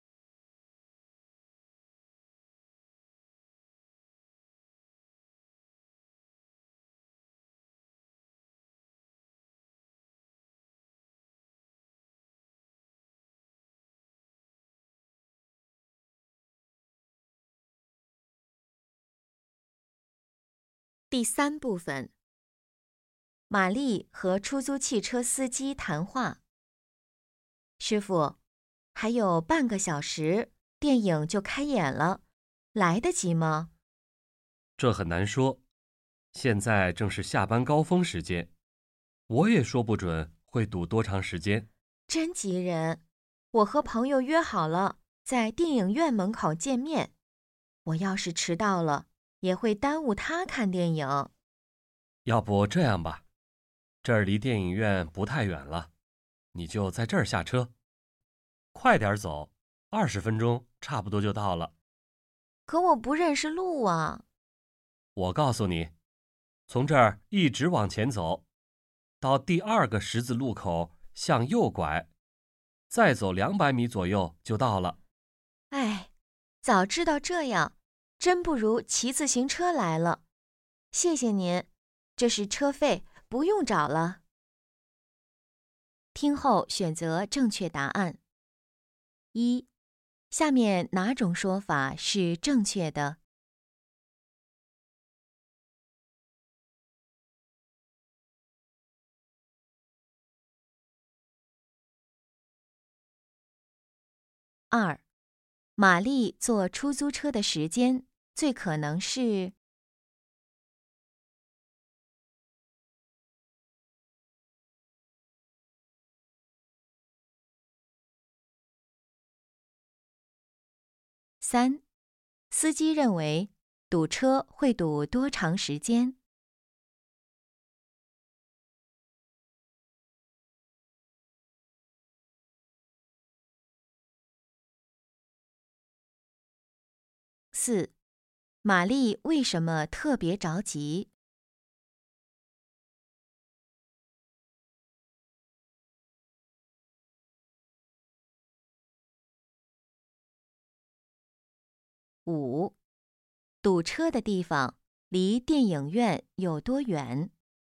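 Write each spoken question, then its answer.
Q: 玛丽坐出租车的时间最可能是?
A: 下班高峰时间

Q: 司机认为堵车会堵多长时间?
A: 说不准

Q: 玛丽为什么特别着急?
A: 她和朋友约好在电影院门口见面,迟到会耽误朋友看电影

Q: 堵车的地方离电影院有多远?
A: 不太远,快点走20分钟左右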